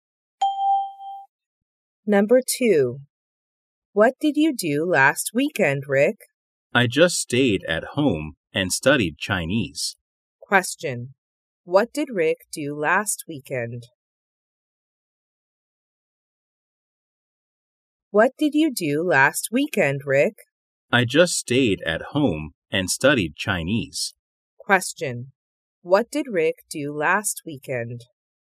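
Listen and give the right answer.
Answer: He stayed at home and studied Chinese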